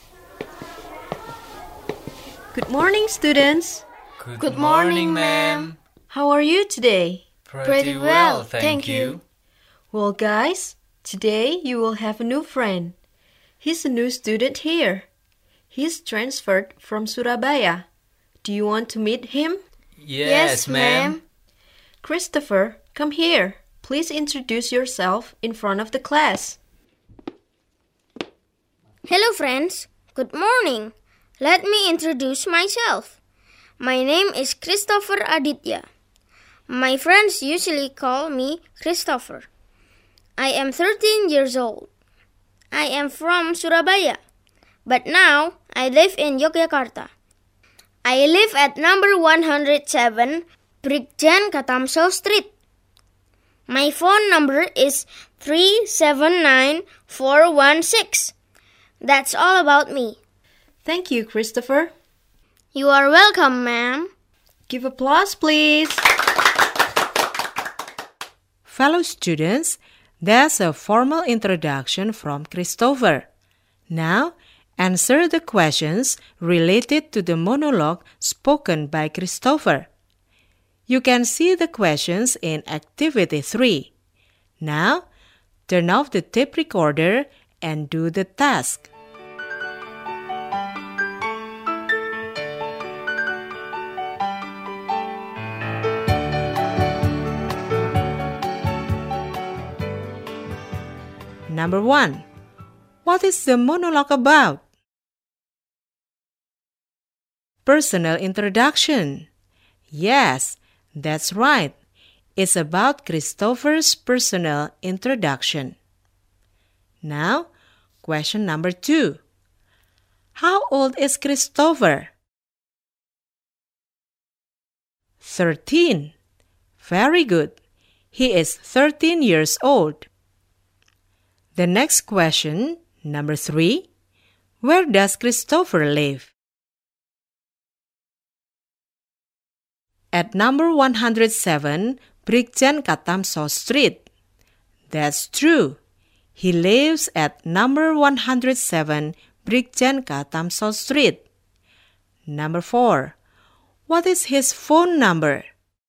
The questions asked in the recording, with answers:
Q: What is the monologue about?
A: It's about Christopher's personal introduction.

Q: How old is Christopher?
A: He is 13 years old.

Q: what is his phone number?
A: His phone number is 379-416.